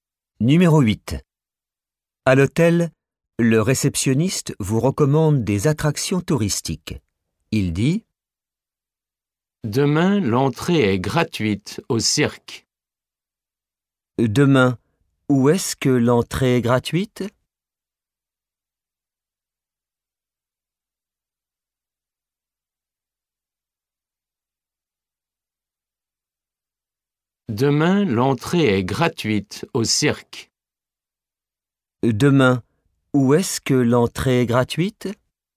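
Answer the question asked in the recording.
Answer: Au cirque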